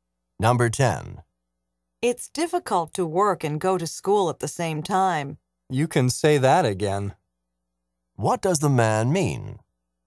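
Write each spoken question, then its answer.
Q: What does the man mean?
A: He agrees that it's difficult.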